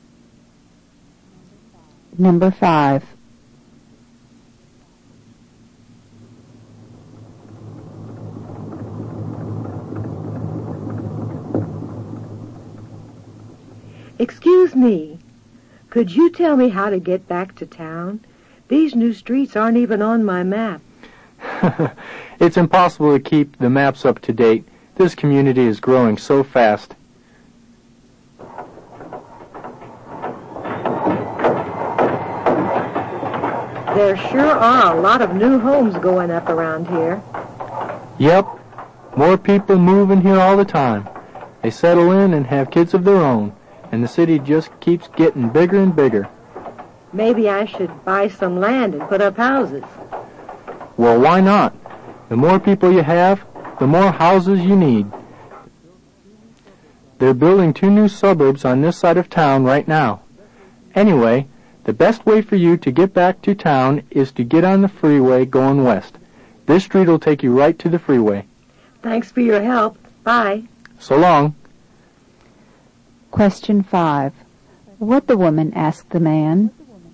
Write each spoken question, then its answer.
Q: What the woman asked the man...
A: The answer is, she asked him for directions.